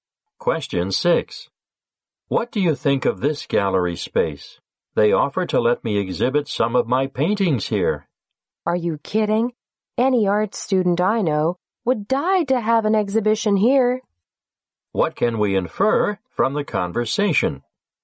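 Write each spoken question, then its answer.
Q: What can we infer from the conversation?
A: The gallery is a very desirable place to exhibit; the woman should accept the offer.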